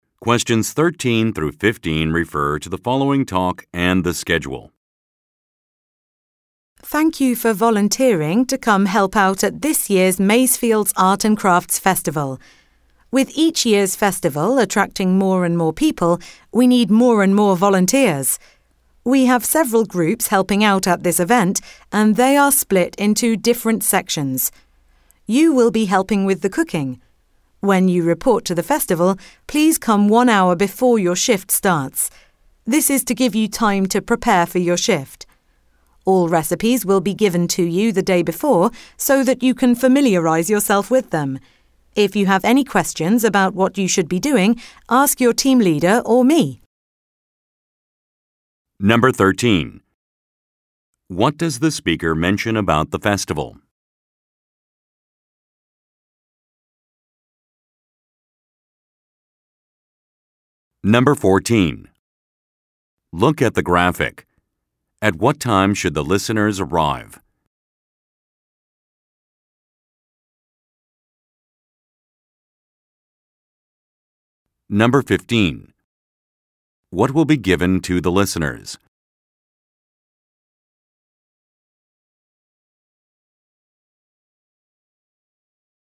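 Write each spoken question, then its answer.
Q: What does the speaker mention about the festival?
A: It attracts more and more people each year.

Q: What will be given to the listeners?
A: Recipes, the day before.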